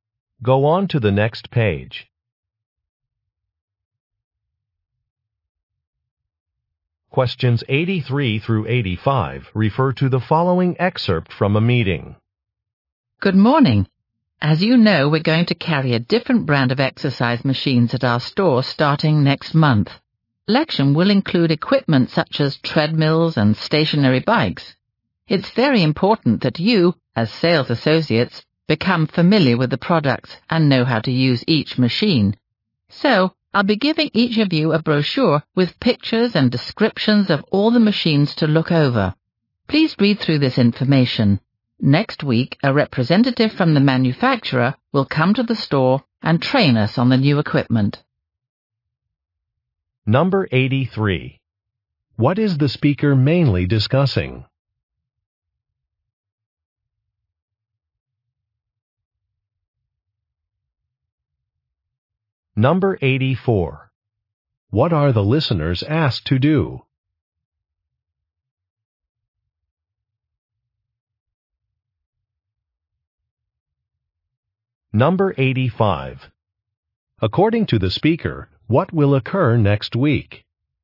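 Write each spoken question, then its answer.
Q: What is the speaker mainly discussing?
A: A new brand of exercise machines the store will sell

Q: What are the listeners asked to do?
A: Read a brochure about the machines

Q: According to the speaker, what will occur next week?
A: A manufacturer's representative will give training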